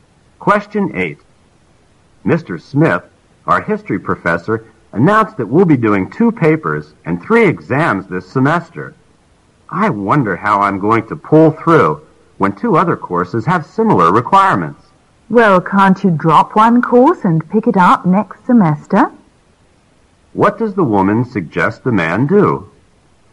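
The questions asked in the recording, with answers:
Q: What does the woman suggest the man do?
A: Drop one course and take it next semester.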